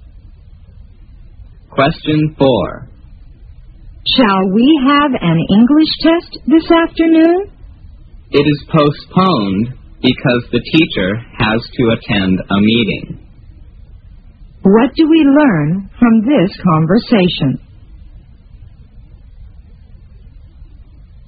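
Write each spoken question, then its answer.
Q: What do we learn from this conversation?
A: The English test has been postponed because the teacher has to attend a meeting.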